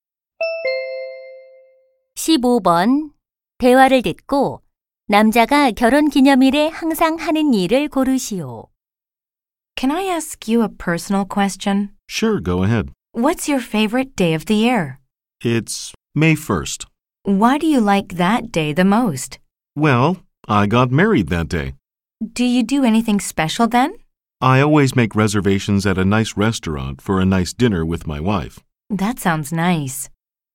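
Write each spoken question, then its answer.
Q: 대화를 듣고 남자가 결혼 기념일에 항상 하는 일을 고르시오.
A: 아내와 저녁 식사를 위해 좋은 레스토랑 예약하기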